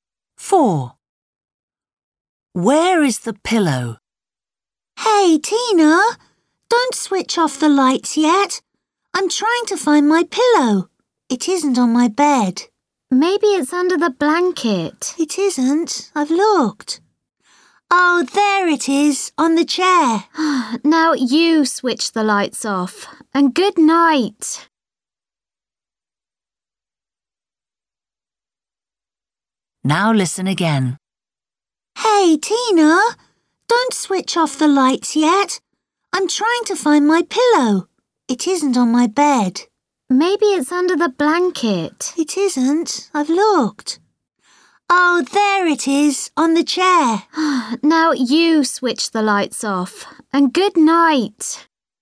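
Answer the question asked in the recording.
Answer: on the chair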